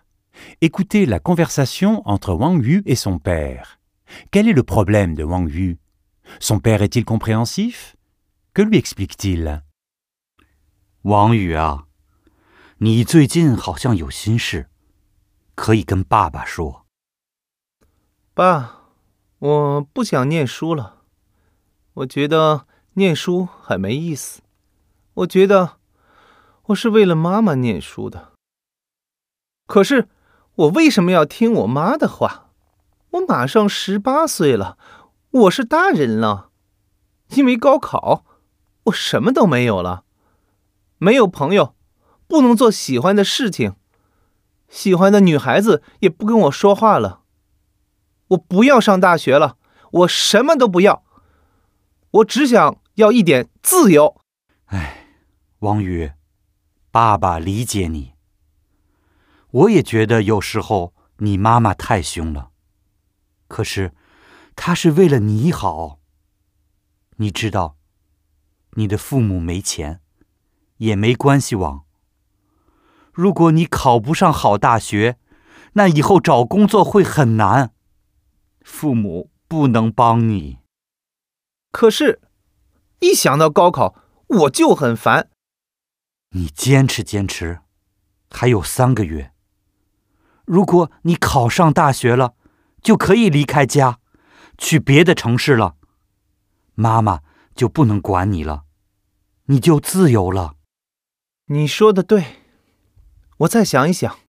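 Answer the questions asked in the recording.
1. Il ne veut plus étudier : il est stressé par le gaokao, n'a plus d'amis ni de liberté et étudie pour sa mère.
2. Oui, il le comprend.
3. Sa mère veut son bien ; sans argent ni relations, il sera difficile de trouver un emploi sans une bonne université. Il doit tenir encore 3 mois, puis il pourra partir dans une autre ville et sera libre.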